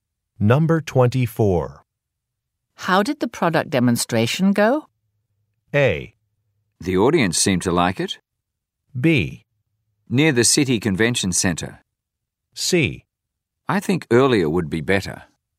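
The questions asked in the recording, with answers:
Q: How did the product demonstration go?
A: A: The audience seemed to like it.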